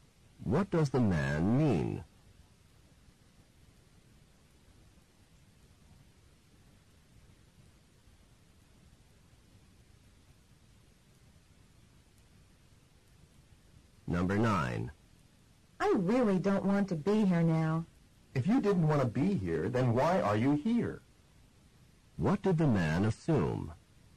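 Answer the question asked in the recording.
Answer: That the woman wanted to be there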